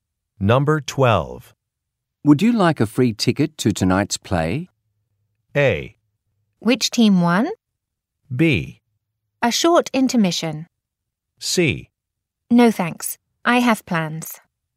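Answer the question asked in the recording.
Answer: C: No thanks. I have plans.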